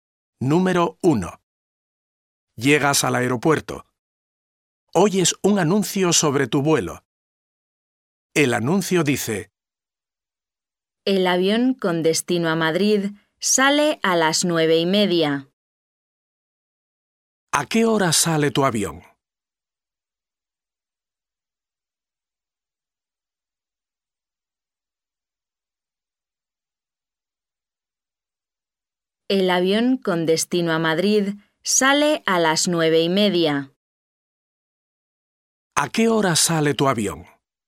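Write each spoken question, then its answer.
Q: ¿A qué hora sale tu avión?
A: A las 9:30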